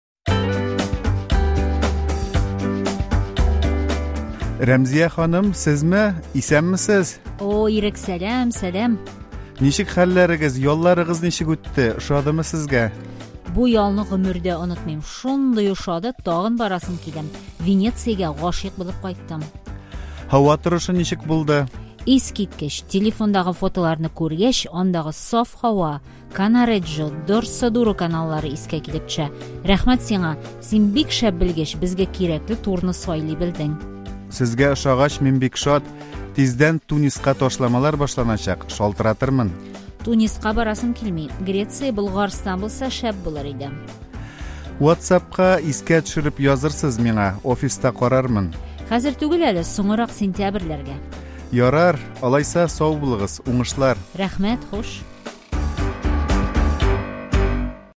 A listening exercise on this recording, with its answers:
Проверьте себя, возможные ответы: "Әйе" / "Юк".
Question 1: Рәмзия ханым Венециягә барып кайткан.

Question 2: Рәмзия ханымның Грециягә һәм Болгарстанга барасы килми.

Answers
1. Әйе
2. Юк

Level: для продолжающих